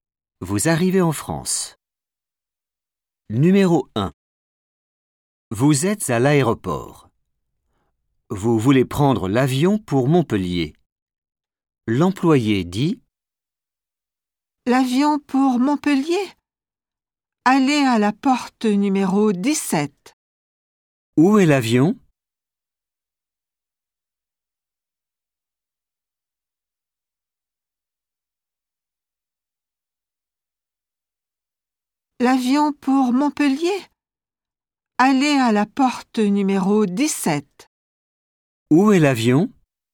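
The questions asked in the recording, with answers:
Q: « Où est l'avion ? »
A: à la porte numéro 17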